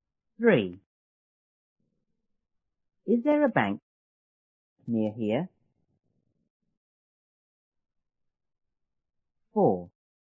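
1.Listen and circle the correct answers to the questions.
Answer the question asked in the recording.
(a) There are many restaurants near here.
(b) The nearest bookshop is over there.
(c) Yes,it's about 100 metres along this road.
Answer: (c) Yes,it's about 100 metres along this road.

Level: 初中英语广州版1B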